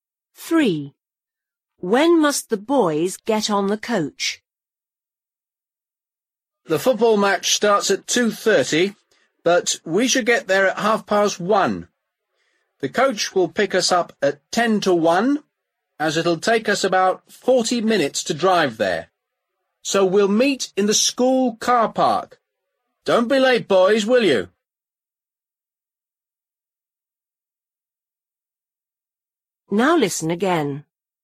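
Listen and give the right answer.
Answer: At ten to one (12:50)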